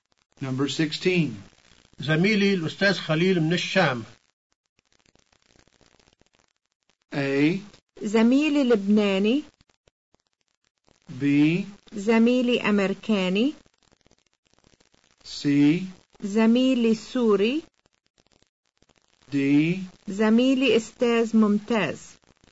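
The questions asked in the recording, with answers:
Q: زميلي الأستاذ خليل من الشام.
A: C: زميلي سوري.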